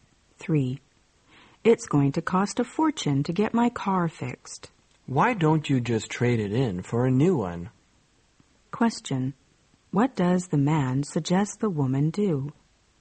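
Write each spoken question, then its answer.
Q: What does the man suggest the woman do?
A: Trade in her car for a new one.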